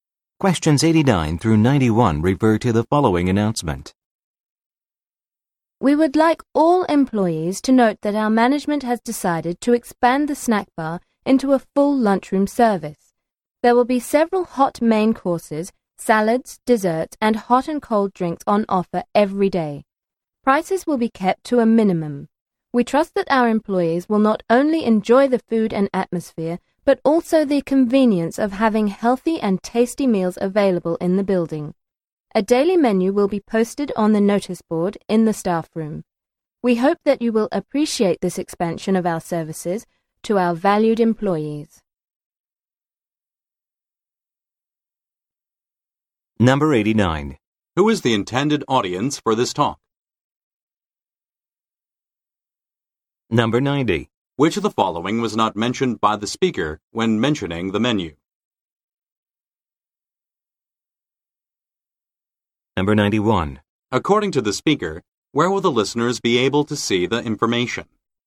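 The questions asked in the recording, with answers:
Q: Who is the intended audience for this talk?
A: Employees

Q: According to the speaker, where will the listeners be able to see the information?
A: On the notice board in the staff room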